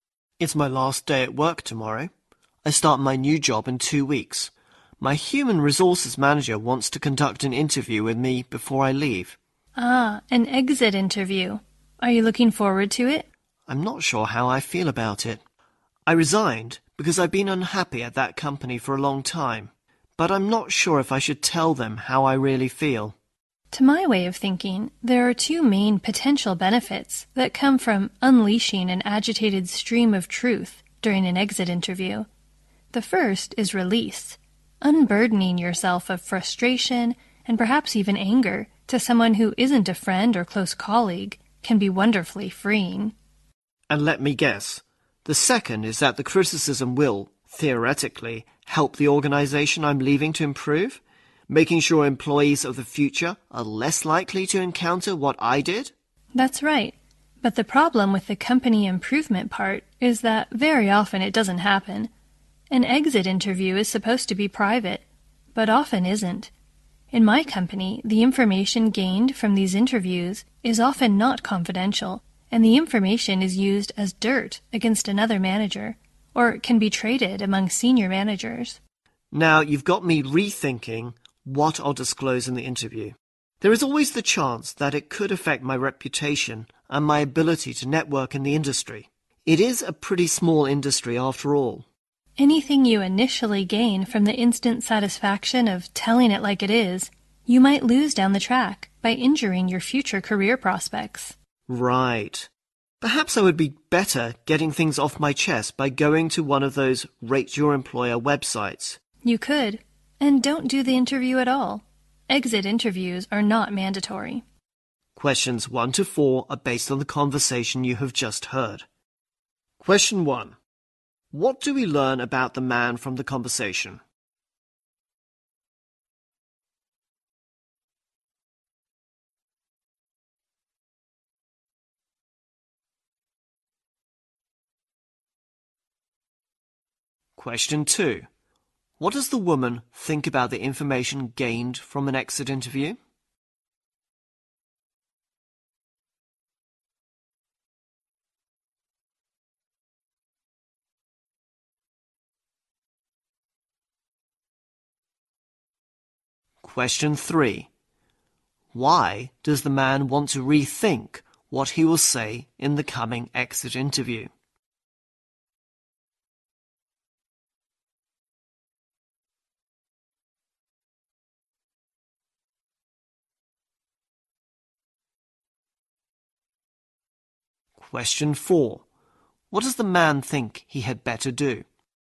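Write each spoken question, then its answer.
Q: What do we learn about the man from the conversation?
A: He resigned because he had been unhappy at his company for a long time.

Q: What does the woman think about the information gained from an exit interview?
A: It is often not kept confidential and can be misused by managers.

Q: Why does the man want to rethink what he will say in the coming exit interview?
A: It could hurt his reputation and his ability to network in a small industry.

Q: What does the man think he had better do?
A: Vent his feelings on a Rate Your Employer website instead.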